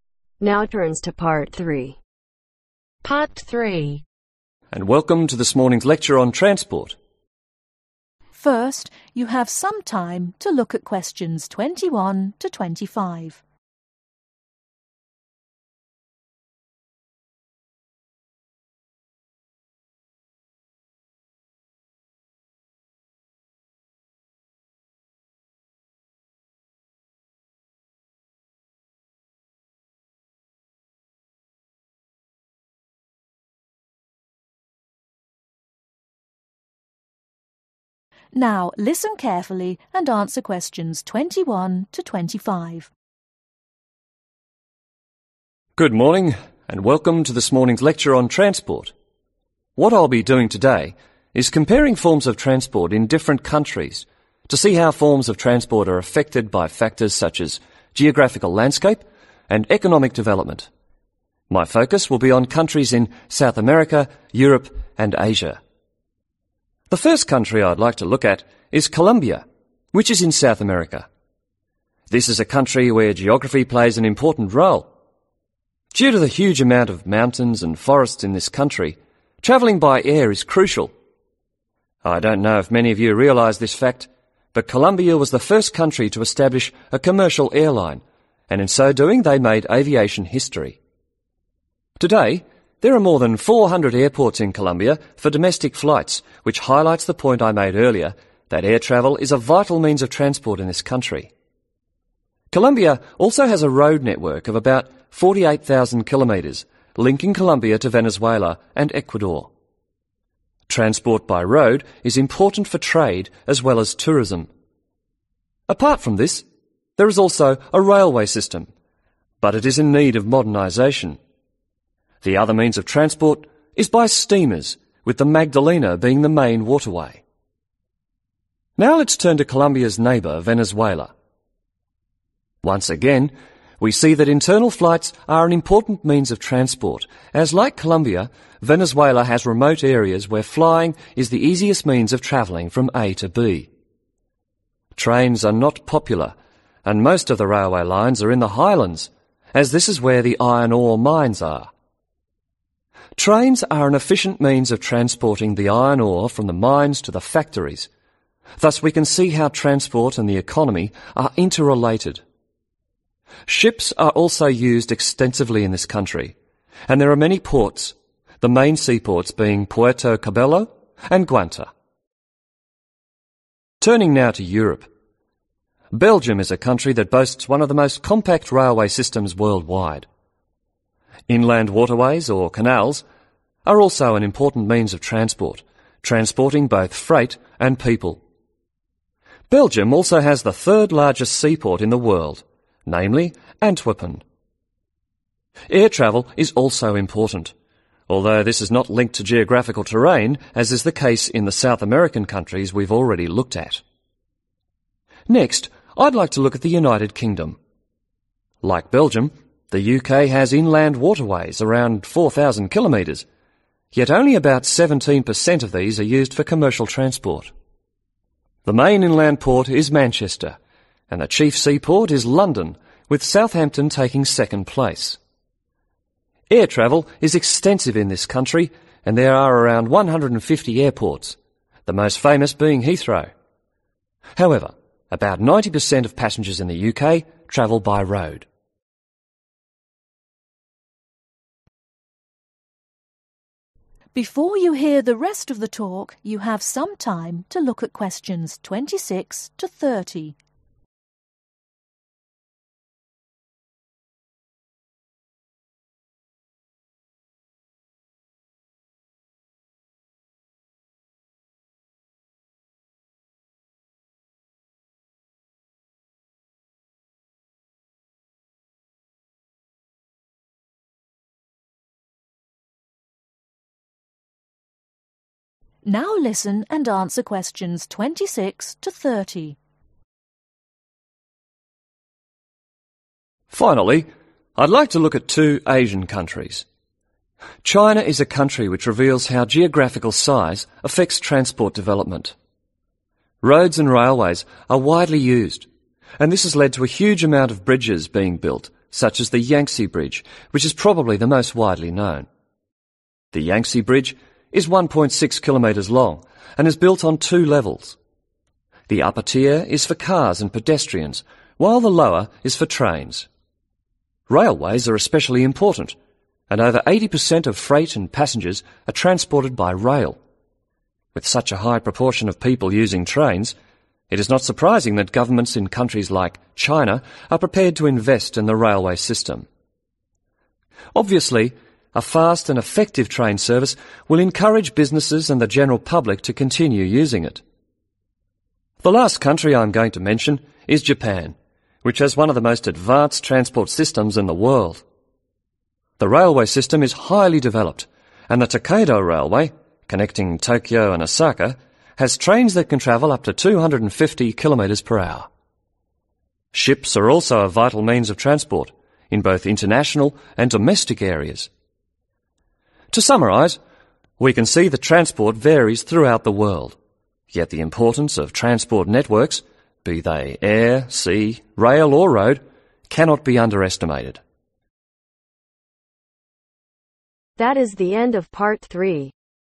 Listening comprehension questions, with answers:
Complete the table of notes below.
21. Made aviation history by establishing the first (21)...........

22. Over (22).............. airports.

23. Iron are mines can be found in (23)..............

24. About (24)............ of inland waterways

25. Proportion of road travelers is around (25)............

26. Transport development in China has been affected by its (26)............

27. Due to the wide use of roads and railways, bridges have been built such as the Yangtze which has two (27)............ , one for cars and people and one for (28)............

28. Due to the wide use of roads and railways, bridges have been built such as the Yangtze which has two (27)............ , one for cars and people and one for (28)............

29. japan has a highly development railway networks with trains that can travel up to (29)............ per hour.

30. Ships are also used for both international and (30)............. transport.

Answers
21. Commercial airline
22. 400
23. Highlands
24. 4000 km
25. 90%
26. Geographical size
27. Levels tiers
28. Trains
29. 250km
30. Domestic